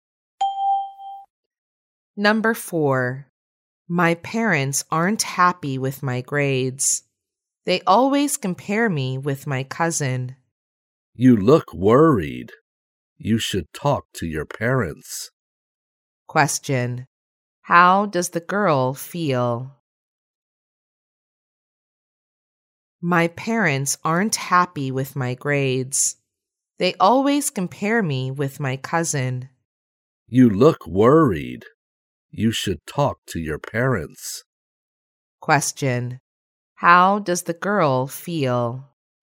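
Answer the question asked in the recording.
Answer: Worried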